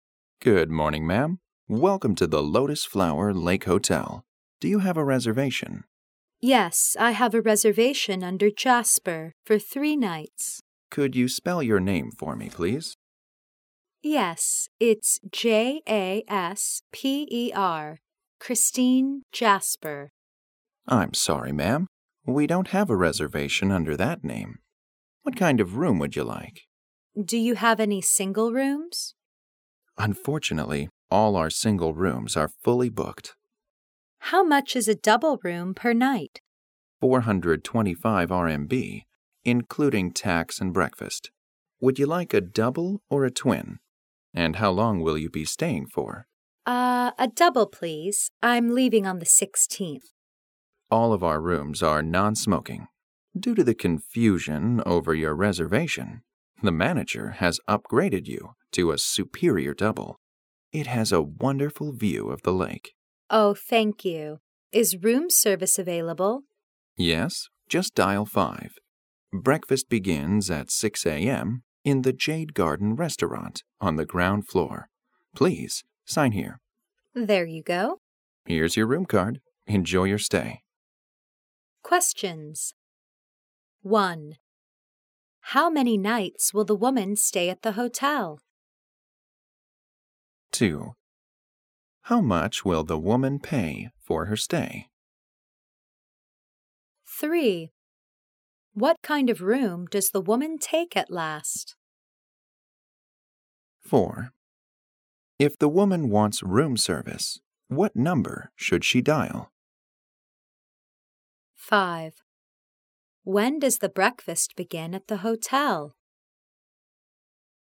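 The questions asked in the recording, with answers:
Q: How many nights will the woman stay at the hotel?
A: 3 nights

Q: What kind of room does the woman take at last?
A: A superior double room

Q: When does the breakfast begin at the hotel?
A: At 6 a.m.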